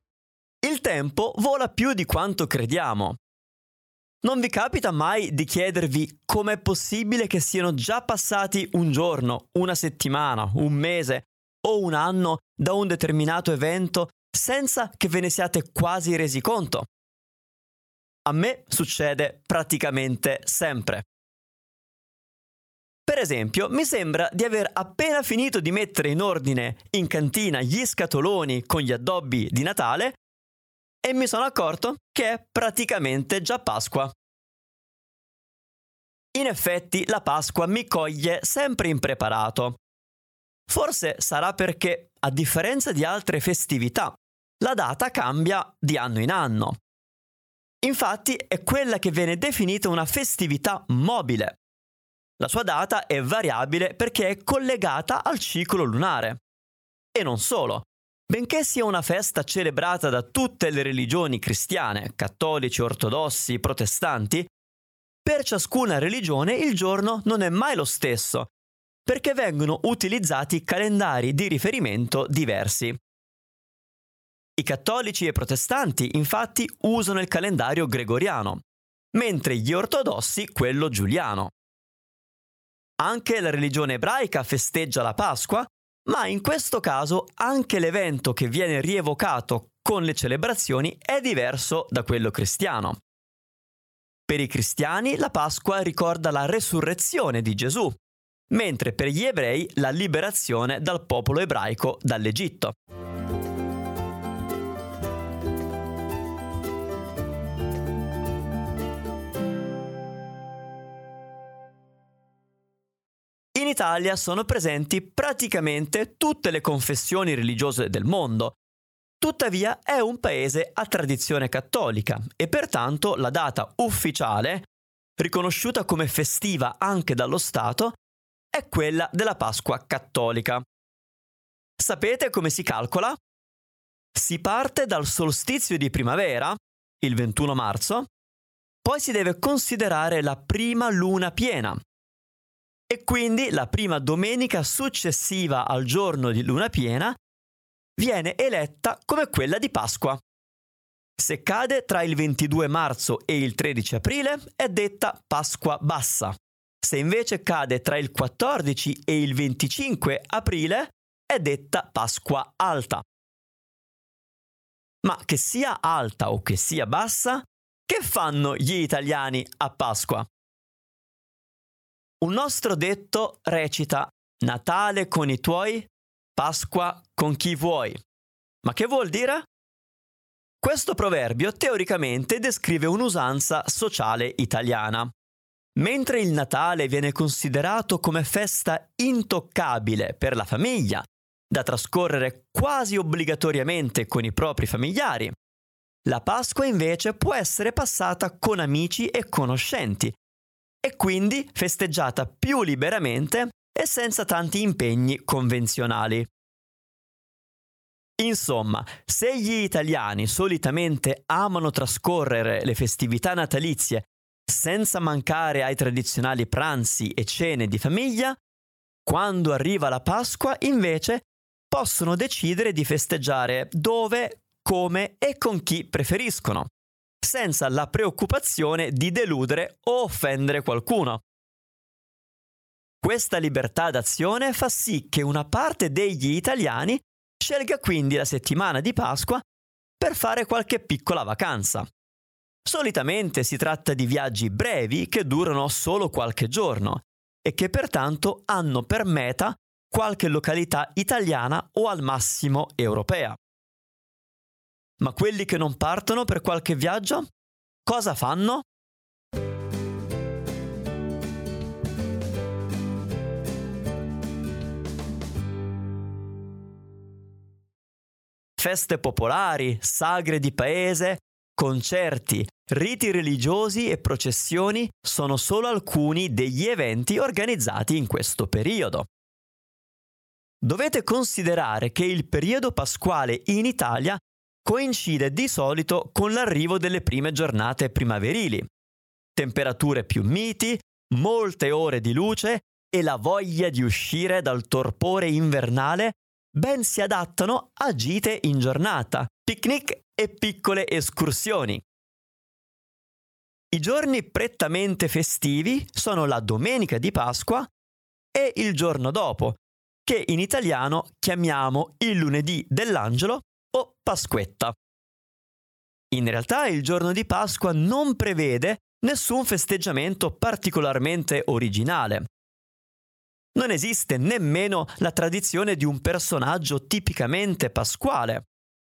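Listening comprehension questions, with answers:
Here are your TRUE/ FALSE Comprehension questions.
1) Il giorno di Pasqua in Italia è quello della Pasqua cattolica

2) Gli italiani trascorrono sempre la Pasqua in famiglia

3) Di solito in Italia la Pasqua coincide con le prime giornate tiepide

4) La "Pasquetta" è la vigilia di Pasqua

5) In Italia si pratica solo la religione cattolica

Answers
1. Vero
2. Falso
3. Vero
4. Falso
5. Falso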